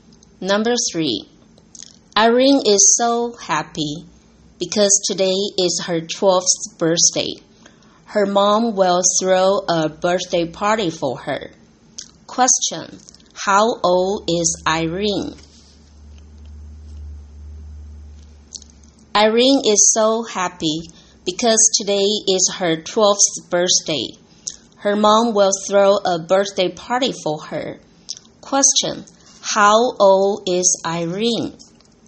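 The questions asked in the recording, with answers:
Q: How old is Irene?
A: 12 years old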